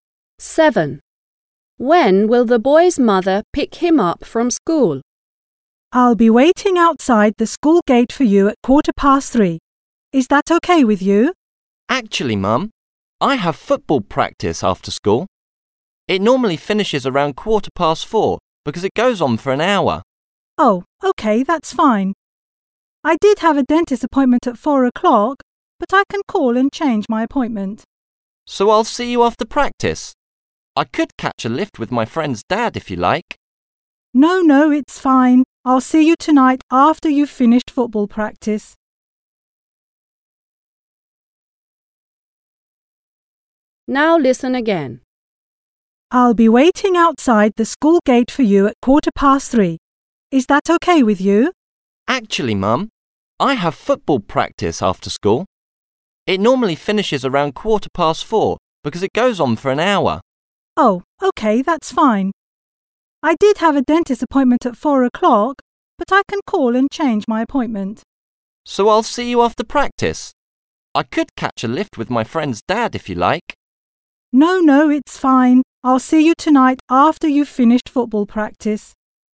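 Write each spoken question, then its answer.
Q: When will the boy's mother pick him up from school?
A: at 4:15, after football practice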